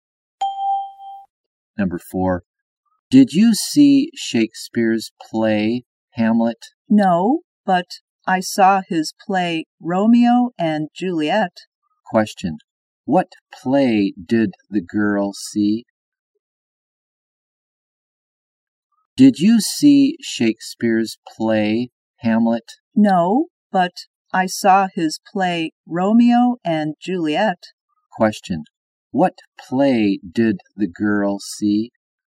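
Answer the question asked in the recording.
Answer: Romeo and Juliet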